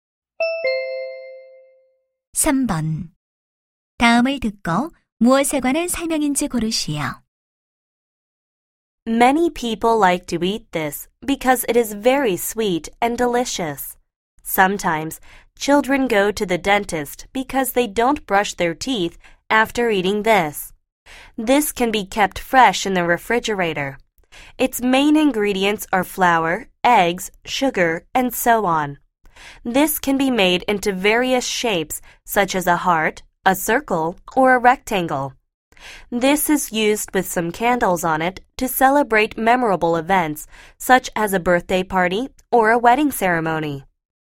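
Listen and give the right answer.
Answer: 케이크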